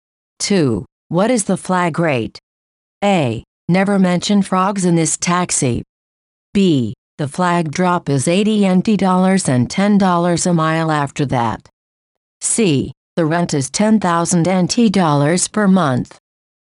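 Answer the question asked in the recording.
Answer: B: The flag drop is $80 and $10 a mile after that.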